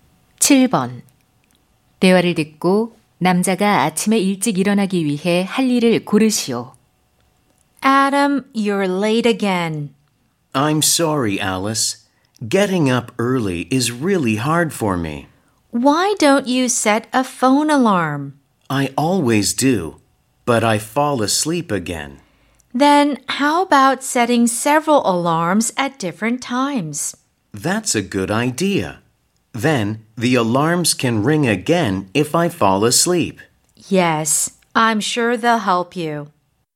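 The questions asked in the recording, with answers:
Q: 대화를 듣고 남자가 아침에 일찍 일어나기 위해 할 일을 고르시오.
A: 여러 시간대에 알람 여러 개 맞추기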